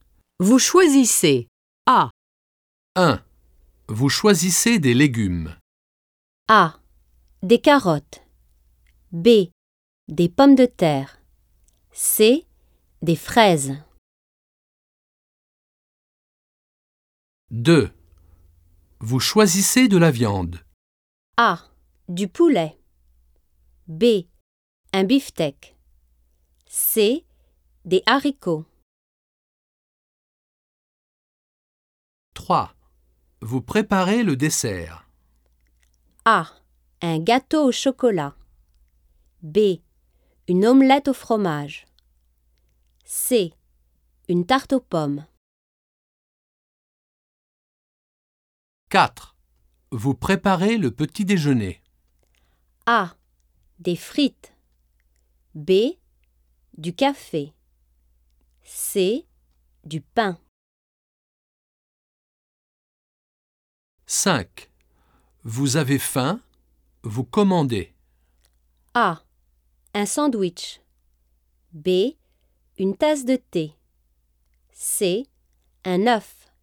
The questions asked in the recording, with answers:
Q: Vous choisissez des légumes.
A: 1. C.

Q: Vous choisissez de la viande.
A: 2. C.

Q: Vous préparez le dessert.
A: 3. B.

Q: Vous préparez le petit déjeuner.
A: 4. A.

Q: Vous avez faim? Vous commandez.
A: 5. B.